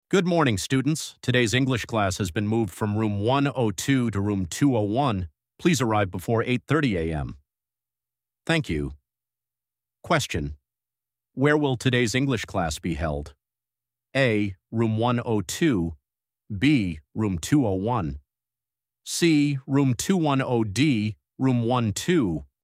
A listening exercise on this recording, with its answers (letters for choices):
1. Where will today's English class be held?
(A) Room 102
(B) Room 201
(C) Room 210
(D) Room 120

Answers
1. B

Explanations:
Bước 1. Đọc câu hỏi để xác định thông tin cần tìm là địa điểm. Bước 2. Khi nghe, chú ý các từ báo hiệu sự thay đổi như moved, changed hoặc delayed. Bước 3. Chọn thông tin xuất hiện sau các từ này. Trong bài nghe, lớp học được chuyển từ Room 102 sang Room 201 nên đáp án đúng là B.

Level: trình độ A1